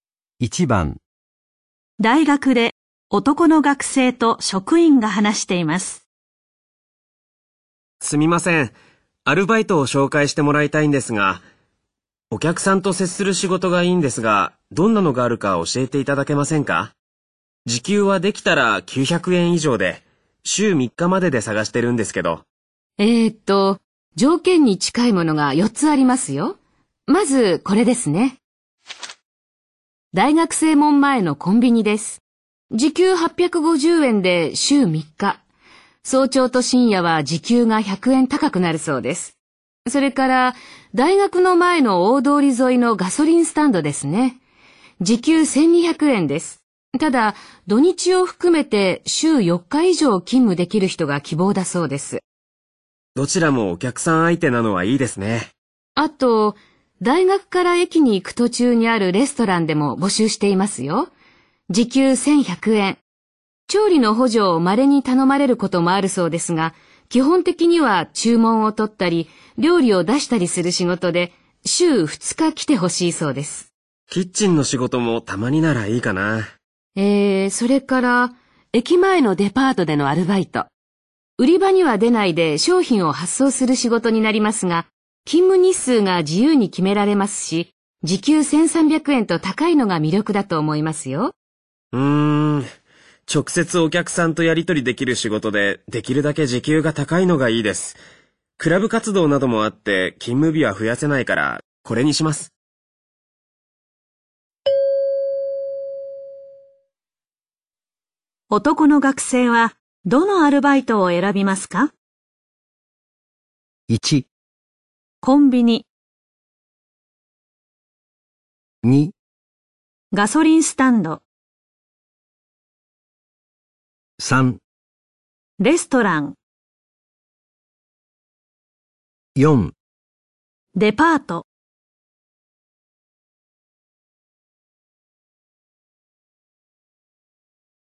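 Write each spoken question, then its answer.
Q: 男の学生は、どのアルバイトを選びますか?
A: 3: レストラン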